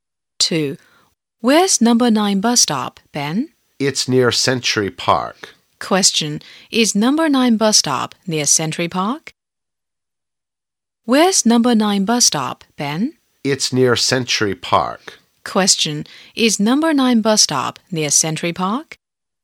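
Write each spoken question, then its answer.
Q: Is number 9 bus stop near Century Park?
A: Yes, it is.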